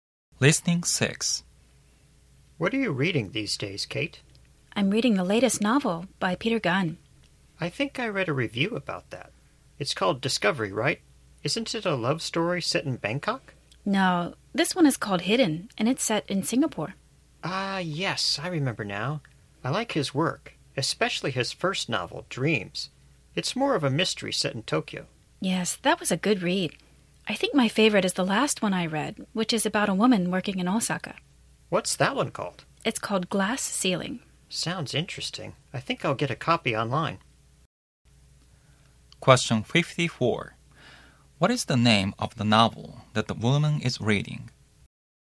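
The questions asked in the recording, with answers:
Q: What is the name of the novel that the woman is reading?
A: Hidden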